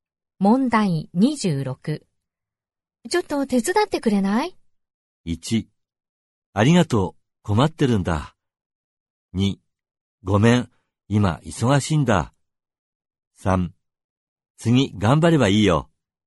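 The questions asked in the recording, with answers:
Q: ちょっと手伝ってくれない?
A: 2: ごめん、今忙しいんだ。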